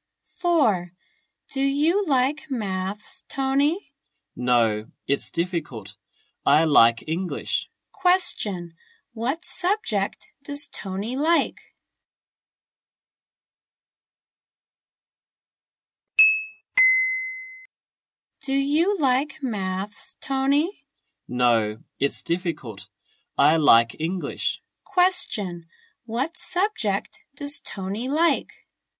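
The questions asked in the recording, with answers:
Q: What subject does Tony like?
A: English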